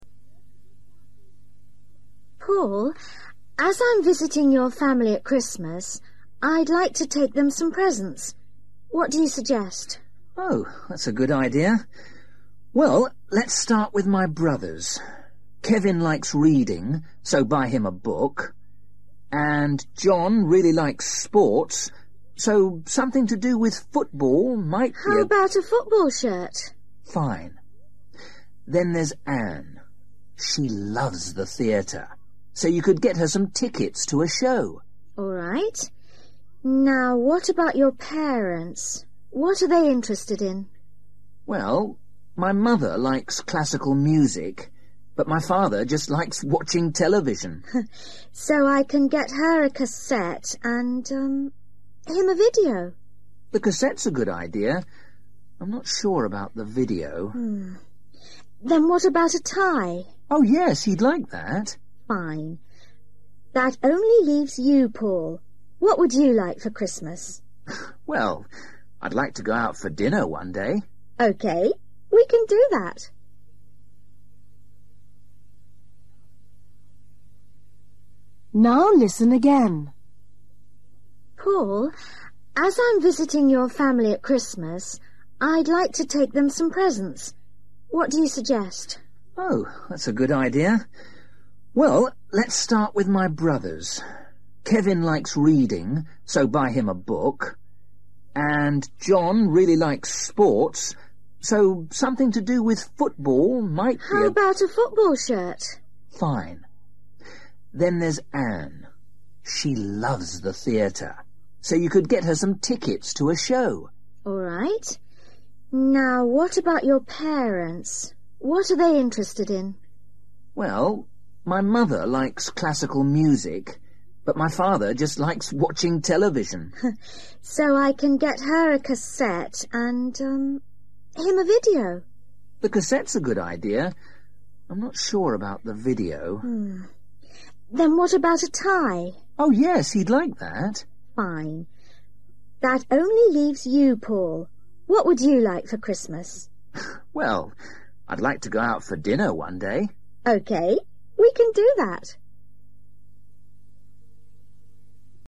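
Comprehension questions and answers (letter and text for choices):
For each question, choose the correct answer.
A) book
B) cassette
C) football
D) meal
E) shirt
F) theatre tickets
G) tie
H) video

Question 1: Jon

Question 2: Ann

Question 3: Mother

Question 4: Father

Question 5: Paul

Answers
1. E) shirt
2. F) theatre tickets
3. B) cassette
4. G) tie
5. D) meal

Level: Luyện nghe trình độ A2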